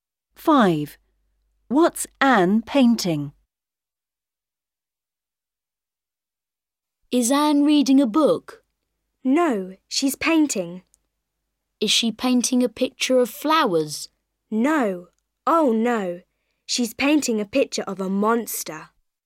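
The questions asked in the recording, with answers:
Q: What's Anne painting?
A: a picture of a monster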